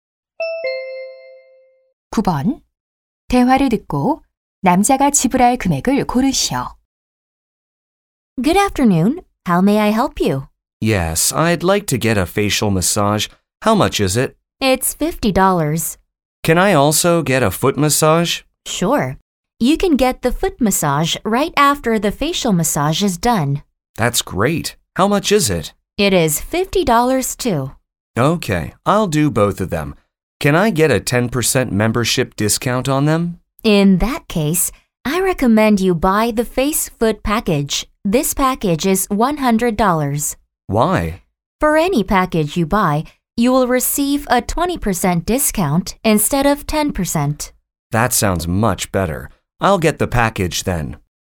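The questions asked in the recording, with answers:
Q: 대화를 듣고 남자가 지불할 금액을 고르시오.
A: $80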